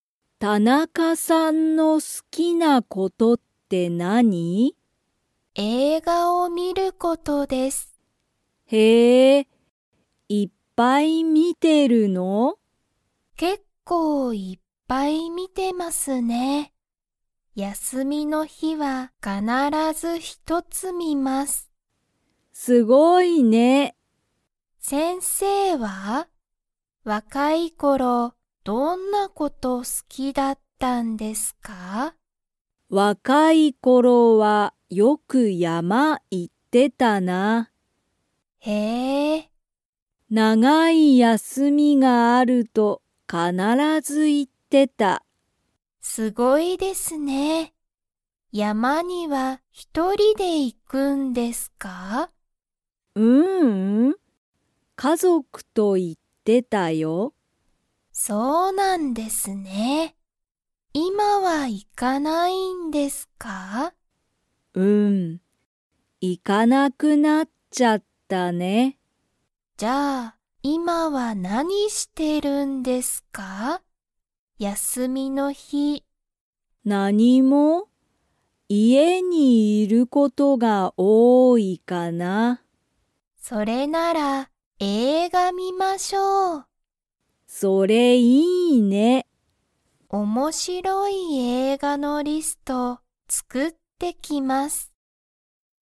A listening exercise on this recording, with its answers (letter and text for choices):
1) 田中(たなか)さんは、映画(えいが)を____観(み)る。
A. 結構(けっこう)いっぱい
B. 家族(かぞく)と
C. 一人(ひとり)で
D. 長(なが)い休(やす)みに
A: A. 結構(けっこう)いっぱい

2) 先生(せんせい)は、山(やま)に一人(ひとり)で行(い)ってましたか?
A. はい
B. いいえ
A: B. いいえ

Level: Level 2